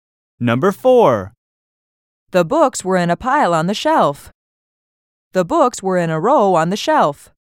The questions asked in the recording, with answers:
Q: The books were in a row on the shelf.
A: Different is the correct answer.